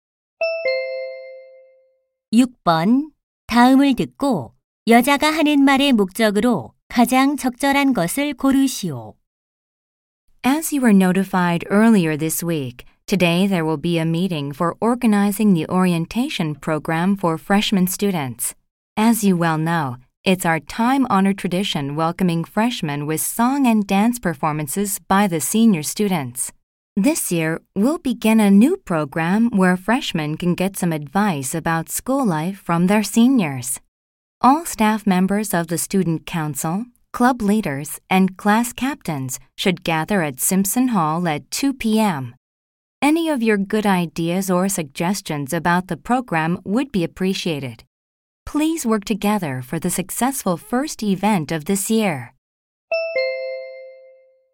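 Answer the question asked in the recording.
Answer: 신입생 오리엔테이션 준비 회의 참석 안내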